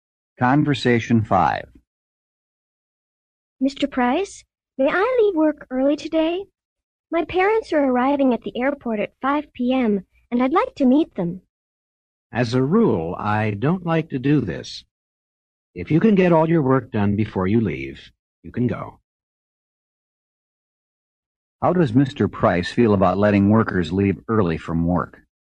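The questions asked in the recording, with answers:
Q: How does Mr. Price feel about letting workers leave early from work?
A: He usually doesn't like it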